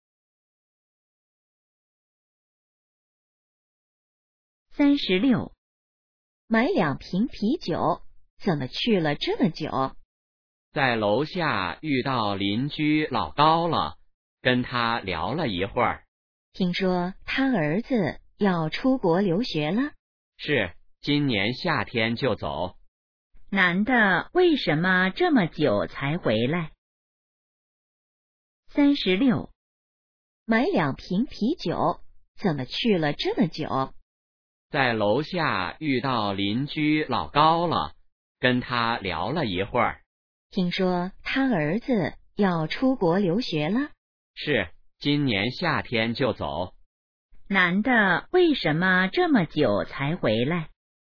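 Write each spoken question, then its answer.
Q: 男的为什么这么久才回来?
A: 在楼下跟邻居老高聊了一会儿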